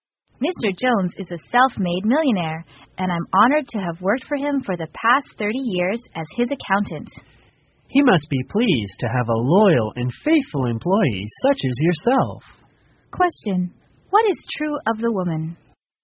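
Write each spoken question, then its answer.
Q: What is true of the woman?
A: She has been Mr. Jones's accountant for 30 years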